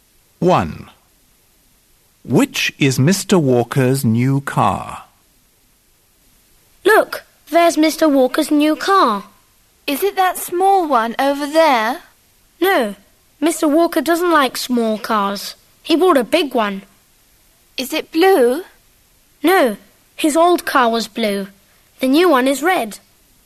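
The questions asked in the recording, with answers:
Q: Which is Mr. Walker's new car?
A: A big red car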